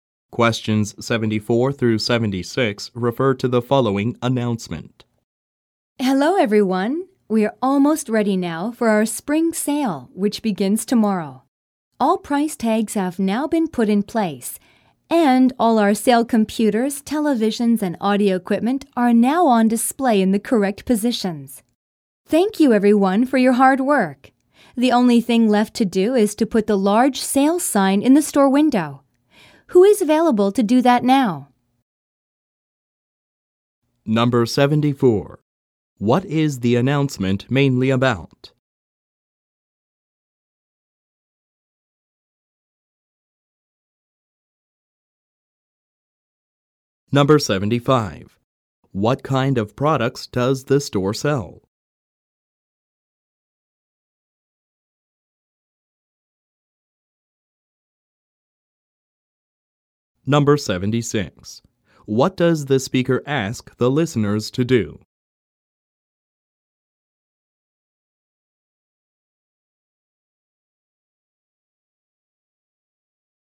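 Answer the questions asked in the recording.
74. Getting ready for the store's spring sale
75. Electronics: computers, televisions and audio equipment
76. Put the large sale sign in the store window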